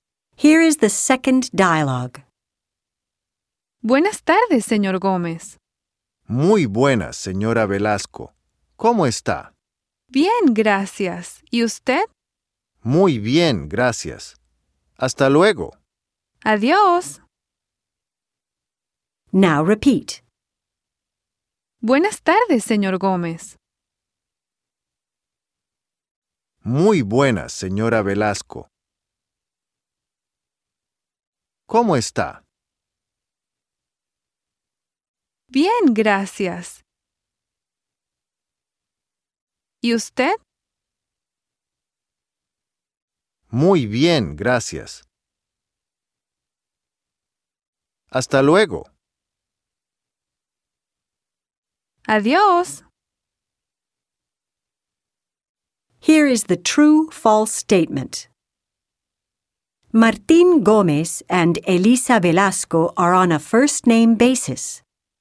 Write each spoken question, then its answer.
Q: Martín Gómez and Elisa Velasco are on a first-name basis.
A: You should have circled the letter F.